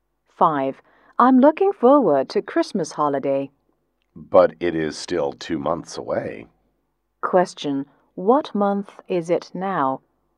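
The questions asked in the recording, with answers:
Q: What month is it now?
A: October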